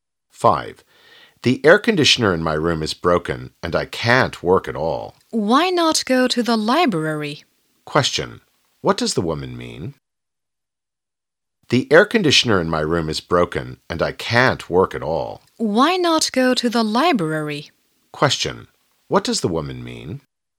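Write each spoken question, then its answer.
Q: What does the woman mean?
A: The man should go to the library to work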